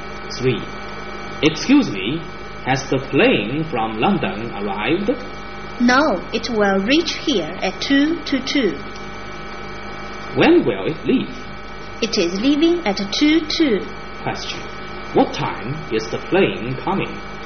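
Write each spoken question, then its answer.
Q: What time is the plane coming?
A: At 2:00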